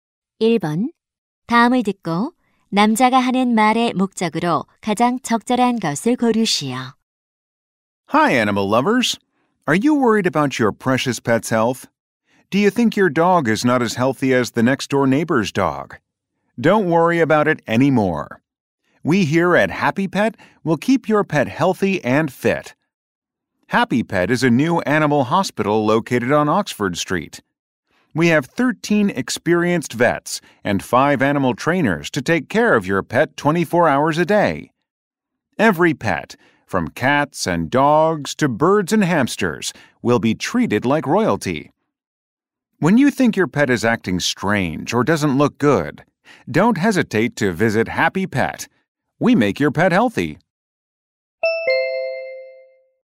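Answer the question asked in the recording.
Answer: 새 동물병원(Happy Pet)을 홍보하려고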